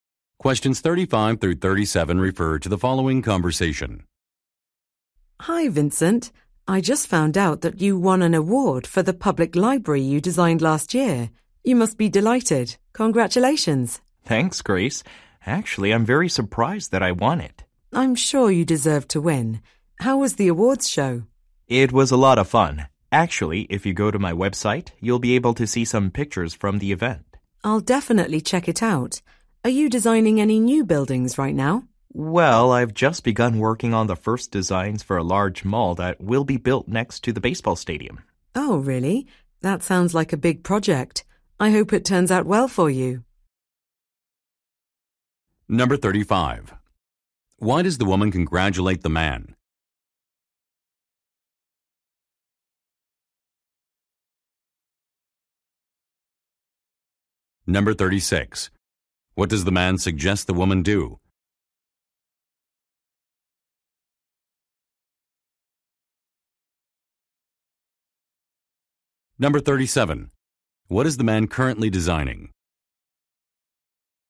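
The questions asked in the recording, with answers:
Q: Why does the woman congratulate the man?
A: He won an award for a library he designed

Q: What does the man suggest the woman do?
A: Visit his website to see pictures

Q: What is the man currently designing?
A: A large shopping mall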